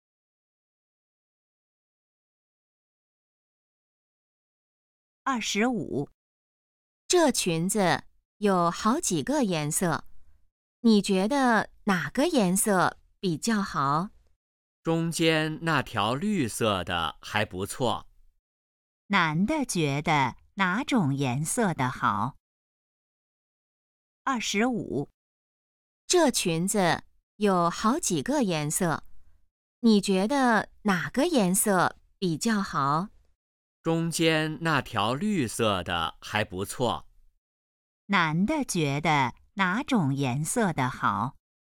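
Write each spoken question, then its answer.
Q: 男的觉得哪种颜色的好?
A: 绿色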